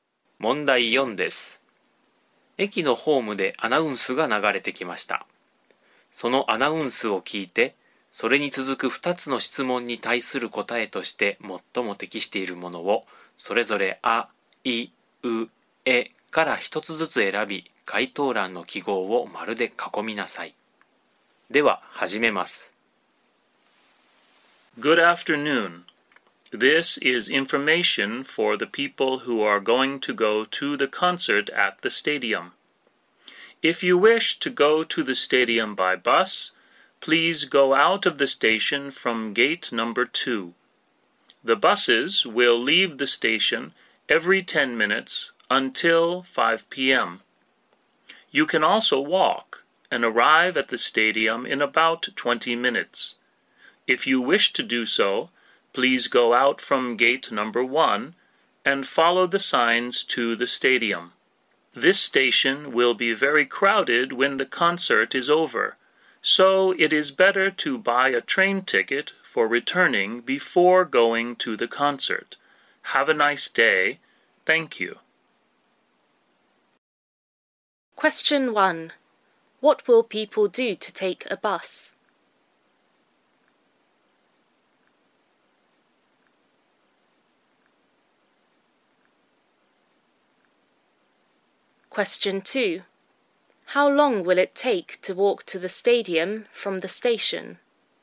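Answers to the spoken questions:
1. Go out of the station from gate number 2
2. About 20 minutes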